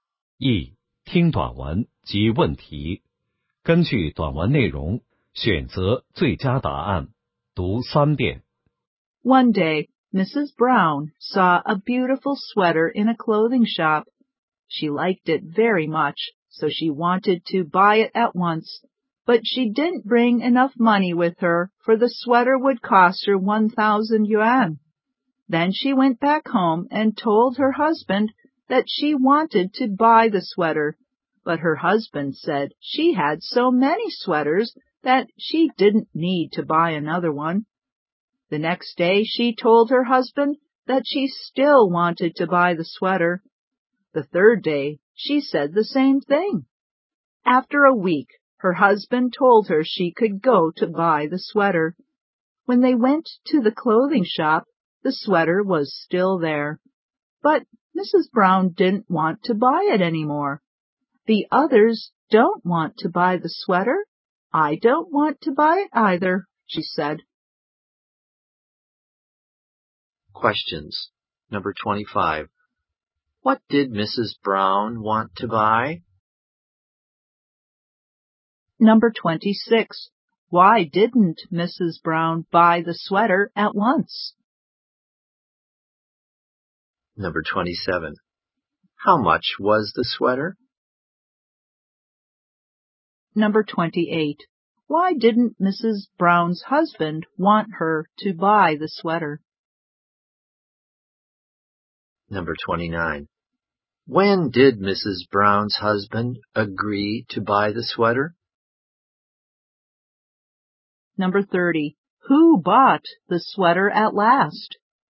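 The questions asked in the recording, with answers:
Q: What did Mrs. Brown want to buy?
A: A sweater

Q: Why didn't Mrs. Brown buy the sweater at once?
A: She didn't bring enough money

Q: How much was the sweater?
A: 1,000 yuan

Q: Why didn't Mrs. Brown's husband want her to buy the sweater?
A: She had so many sweaters

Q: When did Mrs. Brown's husband agree to buy the sweater?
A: After a week

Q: Who bought the sweater at last?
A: Nobody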